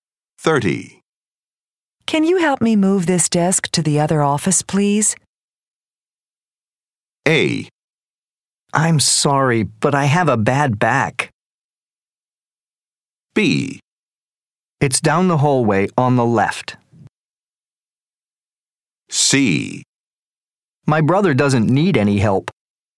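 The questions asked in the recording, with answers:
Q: Can you help me move this desk to the other office, please?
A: A: I'm sorry, but I have a bad back.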